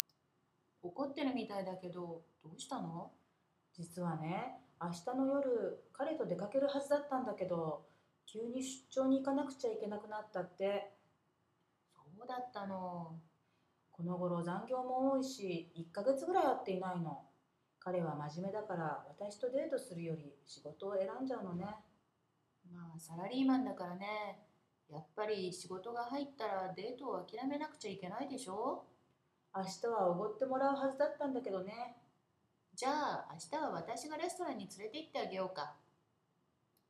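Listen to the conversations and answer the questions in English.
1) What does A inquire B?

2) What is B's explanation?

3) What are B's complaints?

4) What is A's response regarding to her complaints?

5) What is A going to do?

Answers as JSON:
{"1": "What is wrong, since B seems upset", "2": "She was supposed to go out with her boyfriend tomorrow night, but he suddenly has to go on a business trip", "3": "He works a lot of overtime, they haven't met for about a month, and he chooses work over dates with her", "4": "He's an office worker, so he has to give up a date when work comes up", "5": "Take B to a restaurant tomorrow"}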